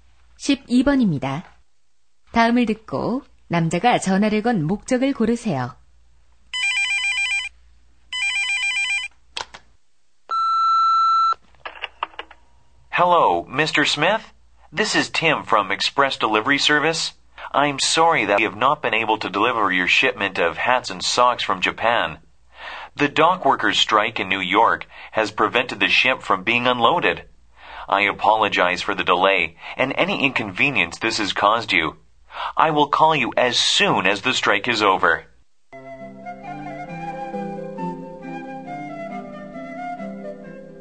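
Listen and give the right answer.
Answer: 배송 지연에 대해 사과하려고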